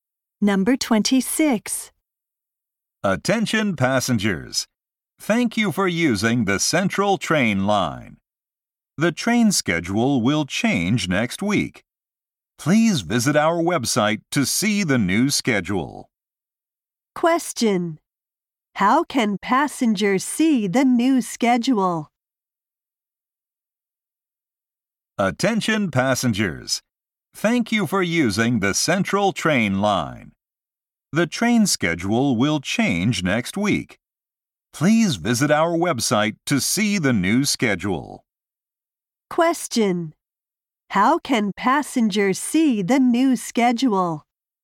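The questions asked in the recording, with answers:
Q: How can passengers see the new schedule?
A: By visiting the website.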